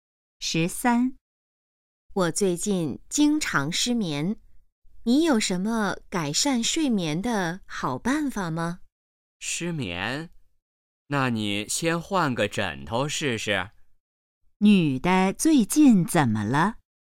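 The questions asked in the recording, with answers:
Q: 女的最近怎么了?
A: 经常失眠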